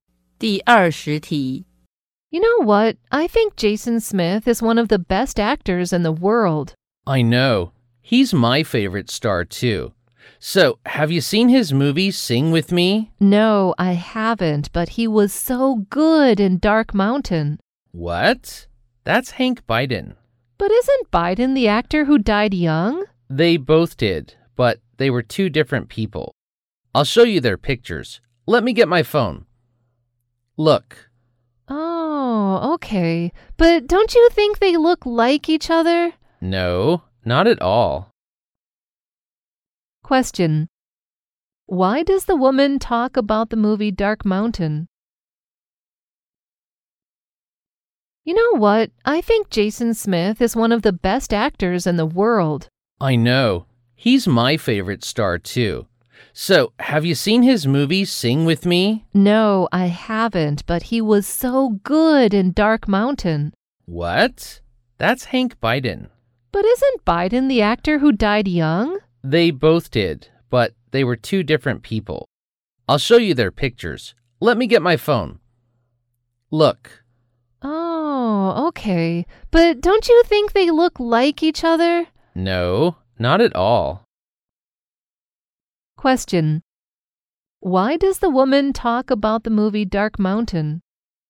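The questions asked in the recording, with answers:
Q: Why does the woman talk about the movie Dark Mountain?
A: She thinks Jason Smith acted in it, confusing him with Hank Biden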